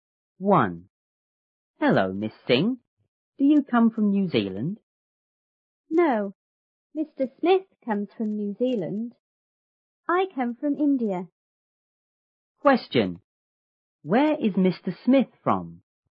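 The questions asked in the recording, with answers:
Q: Where is Mr. Smith from?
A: New Zealand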